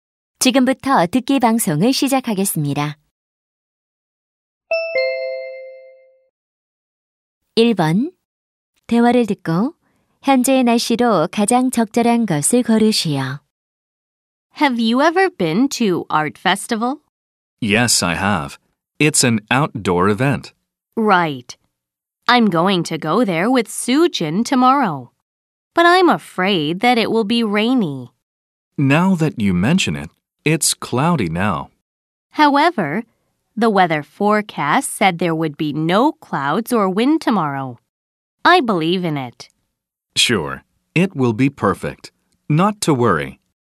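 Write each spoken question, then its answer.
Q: 대화를 듣고 현재의 날씨로 가장 적절한 것을 고르시오.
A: 흐림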